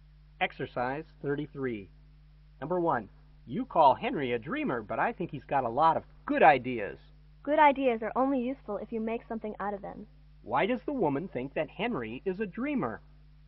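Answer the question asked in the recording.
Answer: He never puts his ideas into practice.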